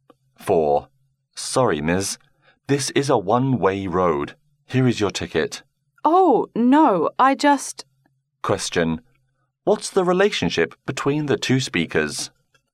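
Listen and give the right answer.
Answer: Police officer and driver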